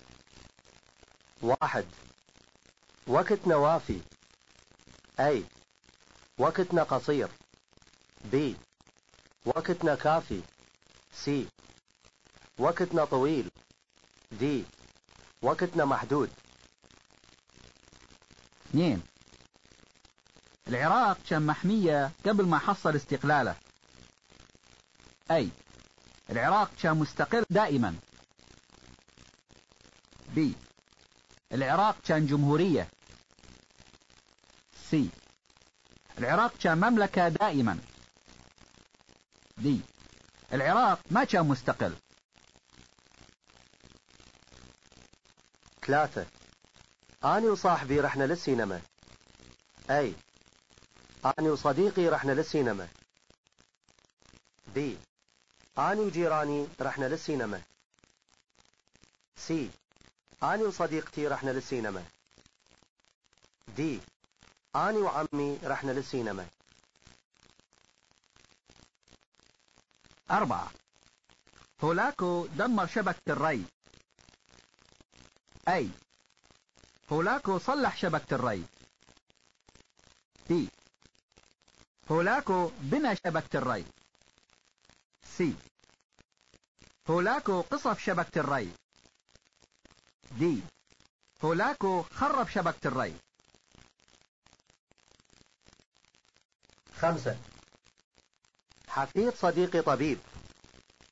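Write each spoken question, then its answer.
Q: العراق كان محمية قبل ما حصل استقلاله A العراق كان مستقر دائما B العراق كان جمهورية C العراق كان مملكة دائما D العراق ما كان مستقل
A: D: العراق ما كان مستقل

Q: أنا وصاحبي رحنا للسينما أي أنا وصديقي رحنا للسينما B أنا وجيراني رحنا للسينما C أنا وصديقتي رحنا للسينما D أنا وعمي رحنا للسينما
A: A: أنا وصديقي رحنا للسينما

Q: هولاكو دمر شبكة الري أي هولاكو صلح شبكة الري B هولاكو بنى شبكة الري C هولاكو قصف شبكة الري D هولاكو خرب شبكة الري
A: D: هولاكو خرب شبكة الري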